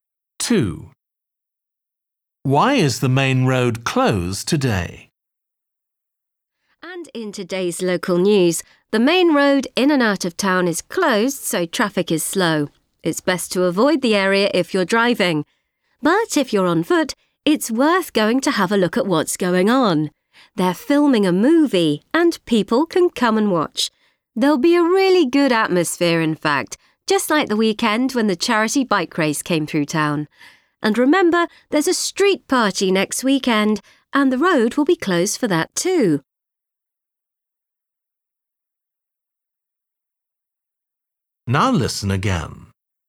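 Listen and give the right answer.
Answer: They're filming a movie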